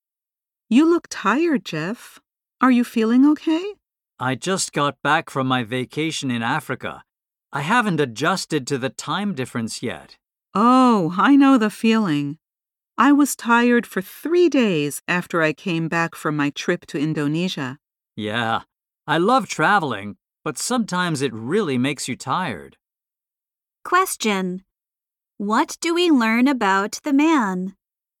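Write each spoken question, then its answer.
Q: What do we learn about the man?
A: He is tired after returning from a vacation in Africa.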